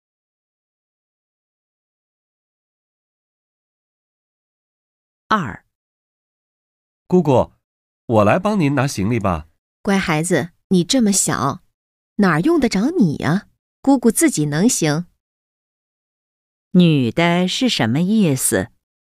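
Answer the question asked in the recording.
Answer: 不用孩子帮忙,自己能拿行李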